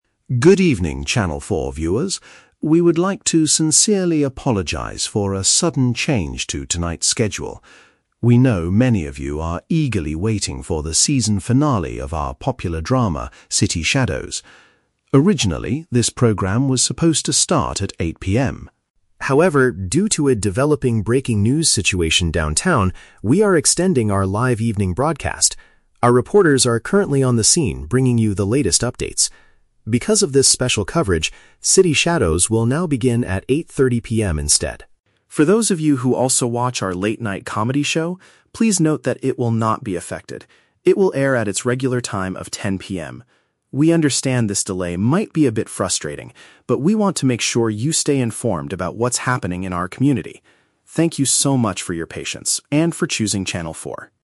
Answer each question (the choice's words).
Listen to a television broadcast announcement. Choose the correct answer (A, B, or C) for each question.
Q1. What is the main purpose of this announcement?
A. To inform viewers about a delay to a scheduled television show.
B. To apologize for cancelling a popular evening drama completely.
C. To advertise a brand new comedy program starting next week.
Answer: To inform viewers about a delay to a scheduled television show.

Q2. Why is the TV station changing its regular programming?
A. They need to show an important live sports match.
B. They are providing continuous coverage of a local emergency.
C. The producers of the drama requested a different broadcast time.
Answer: They are providing continuous coverage of a local emergency.

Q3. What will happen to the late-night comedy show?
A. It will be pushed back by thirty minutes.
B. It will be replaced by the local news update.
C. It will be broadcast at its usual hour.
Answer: It will be broadcast at its usual hour.

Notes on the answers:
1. The announcer apologizes for a "sudden change" and says the drama will "begin at 8:30 PM instead" of 8:00 PM. Option A uses a synonym for this situation (delay). Option B is the Trap: The announcer does "apologize" and mentions the "drama", but the show is only delayed, not cancelled completely. Option C is a plausible TV announcement but is not the main purpose here.
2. The announcer states that they are extending the live broadcast due to a "breaking news situation downtown". Option B paraphrases this perfectly (breaking news downtown = local emergency; extending live broadcast = continuous coverage). Option A is the Trap: Showing live sports is a very common reason for TV delays in real life, but it is not mentioned in this specific audio. Option C is not mentioned.
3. The announcer explicitly states that the comedy show "will not be affected" and will "air at its regular time". Option C paraphrases this (air = broadcast; regular time = usual hour). Option A is the Trap: The drama is pushed back by thirty minutes, not the comedy show. Option B is also a Trap: The breaking news replaces the drama's original time slot, not the late-night comedy slot.

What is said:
Announcer: Good evening, Channel 4 viewers. We would like to sincerely apologize for a sudden change to tonight's schedule. We know many of you are eagerly waiting for the season finale of our popular drama, City Shadows. Originally, this program was supposed to start at 8:00 PM.
However, due to a developing breaking news situation downtown, we are extending our live evening broadcast. Our reporters are currently on the scene bringing you the latest updates. Because of this special coverage, City Shadows will now begin at 8:30 PM instead.
For those of you who also watch our late-night comedy show, please note that it will not be affected. It will air at its regular time of 10:00 PM. We understand this delay might be a bit frustrating, but we want to make sure you stay informed about what's happening in our community. Thank you so much for your patience and for choosing Channel 4.